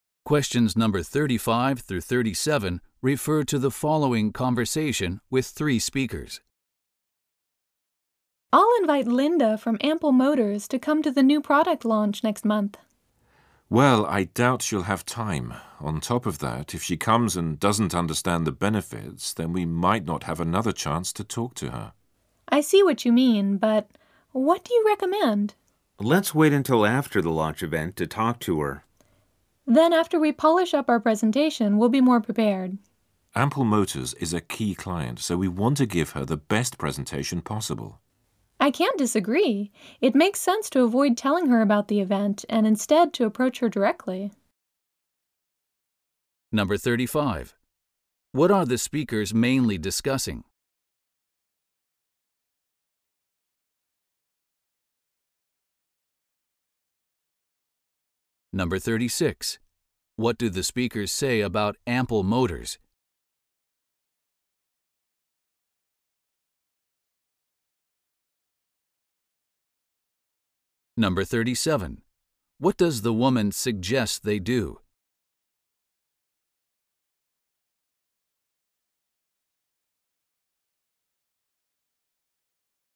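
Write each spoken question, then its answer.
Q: What are the speakers mainly discussing?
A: Whether to invite a client, Linda from Ample Motors, to the new product launch

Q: What do the speakers say about Ample Motors?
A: It is a key client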